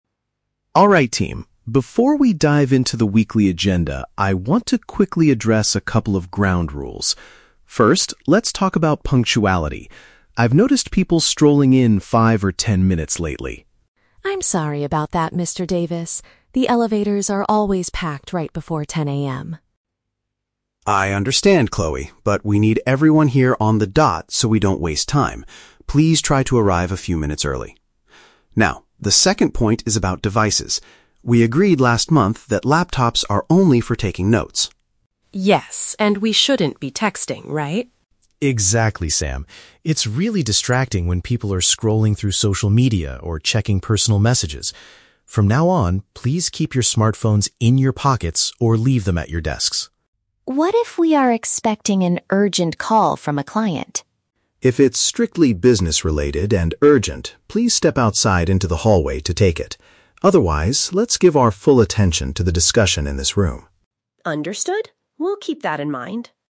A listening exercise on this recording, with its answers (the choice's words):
Listen to the conversation between a manager and his team, then choose the correct answer (A, B, or C).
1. What is the first issue the manager brings up?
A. The team's failure to complete the weekly agenda.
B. Employees not arriving at the scheduled time.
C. The frequent breakdown of the office elevators.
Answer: Employees not arriving at the scheduled time.

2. What is the rule regarding mobile phones during meetings?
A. They must be used exclusively to type meeting notes.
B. They are completely forbidden from being brought into the office.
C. They should be put away and not used for personal matters.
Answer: They should be put away and not used for personal matters.

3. What should a staff member do if they receive an important work-related call?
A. Answer the call quietly while remaining at the table.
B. Leave the meeting room to speak with the client.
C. Decline the call and message the person back later.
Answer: Leave the meeting room to speak with the client.

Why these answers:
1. The manager says he wants to talk about "punctuality" because people are "strolling in five or ten minutes late." Option B accurately paraphrases this situation.
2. Mr. Davis asks the team to "keep your smartphones in your pockets" (put away) and stop checking "personal messages" (not used for personal matters).
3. The manager says if the call is urgent and business-related, they should "step outside into the hallway." Option B paraphrases this as "leave the meeting room."

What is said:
Mr. Davis: Alright team, before we dive into the weekly agenda, I want to quickly address a couple of ground rules. First, let's talk about punctuality. I've noticed people strolling in five or ten minutes late lately.
Chloe: I'm sorry about that, Mr. Davis. The elevators are always packed right before 10 AM.
Mr. Davis: I understand, Chloe, but we need everyone here on the dot so we don't waste time. Please try to arrive a few minutes early. Now, the second point is about devices. We agreed last month that laptops are only for taking notes.
Sam: Yes, and we shouldn't be texting, right?
Mr. Davis: Exactly, Sam. It's really distracting when people are scrolling through social media or checking personal messages. From now on, please keep your smartphones in your pockets or leave them at your desks.
Chloe: What if we are expecting an urgent call from a client?
Mr. Davis: If it's strictly business-related and urgent, please step outside into the hallway to take it. Otherwise, let's give our full attention to the discussion in this room.